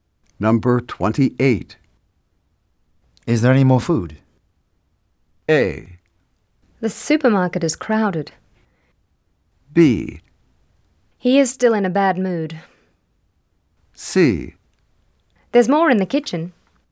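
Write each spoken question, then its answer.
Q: Is there any more food?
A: C: There's more in the kitchen.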